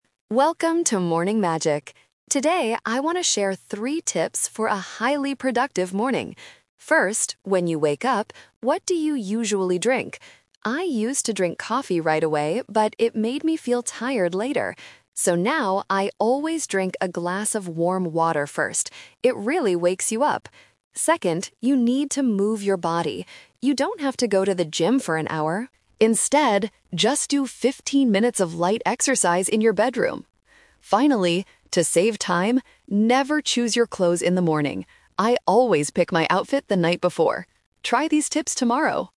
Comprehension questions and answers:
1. What does the host drink right after waking up now?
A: Warm water

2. Where does the host suggest doing morning exercise?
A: In the bedroom

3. When should you choose your clothes, according to the podcast?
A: The night before

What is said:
Host: Welcome to Morning Magic! Today, I want to share three tips for a highly productive morning. First, when you wake up, what do you usually drink? I used to drink coffee right away, but it made me feel tired later. So now, I always drink a glass of warm water first. It really wakes you up! Second, you need to move your body. You don't have to go to the gym for an hour. Instead, just do fifteen minutes of light exercise in your bedroom. Finally, to save time, never choose your clothes in the morning. I always pick my outfit the night before. Try these tips tomorrow!

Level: A2